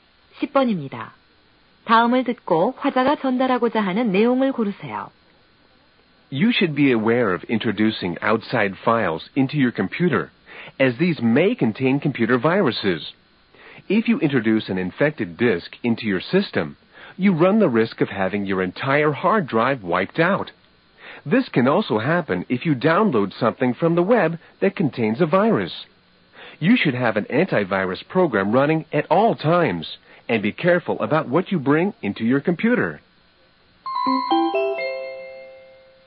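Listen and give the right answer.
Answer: 컴퓨터 바이러스에 주의하고 백신 프로그램을 항상 실행하라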